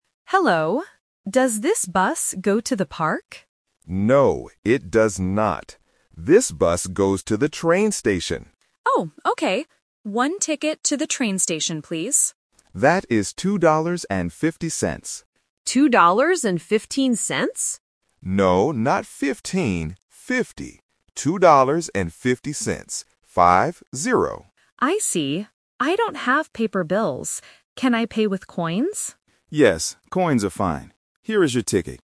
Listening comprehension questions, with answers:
Listen to the conversation and choose the correct answer (A, B, or C).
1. Where is the passenger going?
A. To the park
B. To the train station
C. To the airport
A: B. To the train station

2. How much does the ticket cost?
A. $2.15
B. $2.50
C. $5.20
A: B. $2.50

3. How does the passenger pay for the ticket?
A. With paper bills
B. With a credit card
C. With coins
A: C. With coins

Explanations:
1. The passenger asks if the bus goes to the park (The Trap). The driver says no, the bus goes to the train station. The passenger then buys a ticket to the train station (The Key).
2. The driver says the price is "two dollars and fifty cents" (The Key). The passenger mishears it as "fifteen cents" (The Trap). The driver corrects this and says "Five, zero".
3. The passenger says, "I don't have paper bills" (The Trap). Then, the passenger asks to pay with coins, and the driver says yes (The Key). Credit cards are not mentioned.

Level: A1

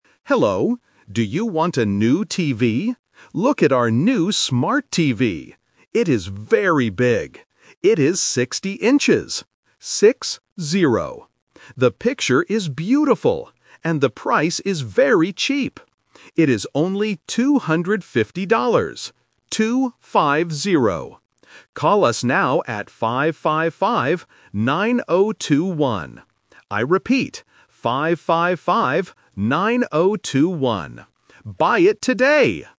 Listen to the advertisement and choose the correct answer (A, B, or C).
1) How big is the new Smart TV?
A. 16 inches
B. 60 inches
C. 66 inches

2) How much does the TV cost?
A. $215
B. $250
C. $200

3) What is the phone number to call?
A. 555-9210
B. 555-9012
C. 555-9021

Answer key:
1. B. 60 inches
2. B. $250
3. C. 555-9021

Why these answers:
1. The correct answer is B. The announcer explicitly says the TV is "60 inches" and repeats "Six-zero". Option A (16 inches) is the trap because the numbers "sixteen" and "sixty" sound very similar, which is a common mistake for beginners. Option C is just a wrong number.
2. The correct answer is B. The announcer says the price is "250 dollars" and spells out "Two-five-zero". Option A ($215) is a trap because "fifteen" and "fifty" are easily confused. Option C ($200) is a plausible price but is not mentioned.
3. The correct answer is C. The announcer says the number is "5-5-5, 9-0-2-1". Option B (555-9012) is the trap because the last two numbers are swapped (12 instead of 21) to test the listener's concentration. Option A is another incorrect combination of the same numbers.

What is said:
Announcer: Hello! Do you want a new TV? Look at our new Smart TV! It is very big. It is 60 inches. The picture is beautiful. And the price is very cheap. It is only 250 dollars.

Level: A1

